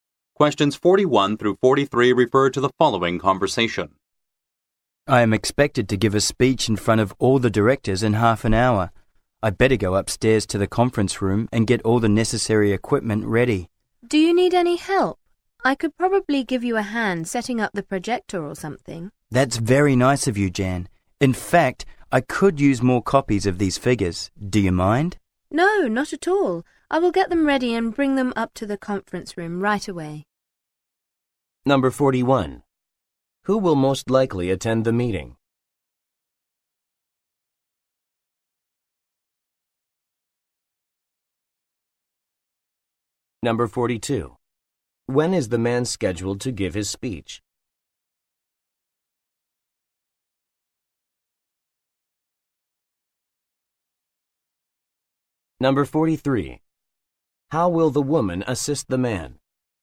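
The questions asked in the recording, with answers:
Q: Who will most likely attend the meeting?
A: The directors

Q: When is the man scheduled to give his speech?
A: In half an hour

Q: How will the woman assist the man?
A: By making more copies of the figures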